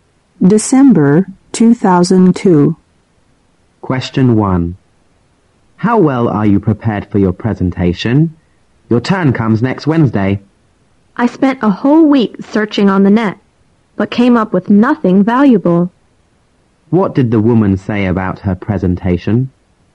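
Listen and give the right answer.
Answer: She hasn't found anything useful for it after a week of searching online.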